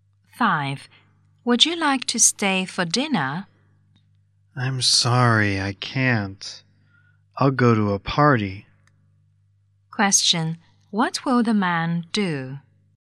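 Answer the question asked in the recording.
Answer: Go to a party.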